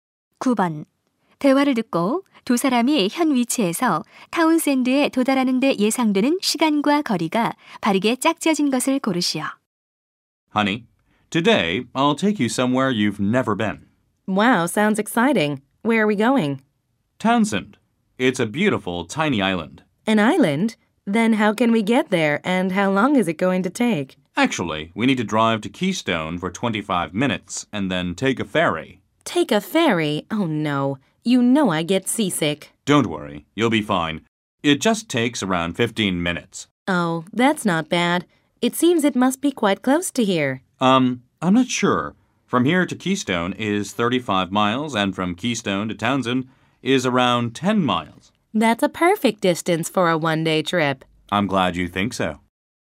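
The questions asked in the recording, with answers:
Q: 대화를 듣고 두 사람이 현 위치에서 타운샌드에 도달하는 데 예상되는 시간과 거리가 바르게 짝지어진 것을 고르시오.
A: 40분, 45마일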